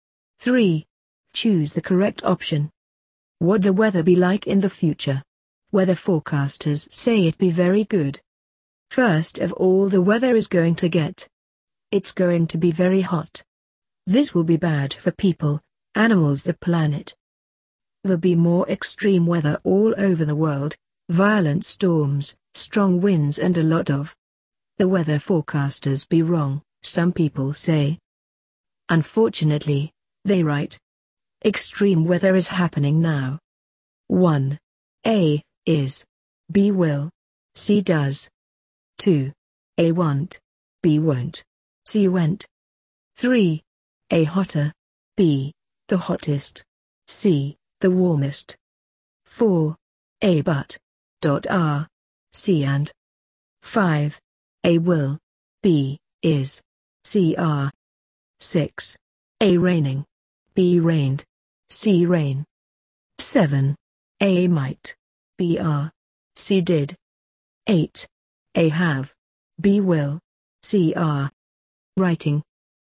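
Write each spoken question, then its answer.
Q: 1. A. Is. B. Will. C. Does.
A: B: Will

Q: 2. A. Want. B. Won't. C. Went.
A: B: Won't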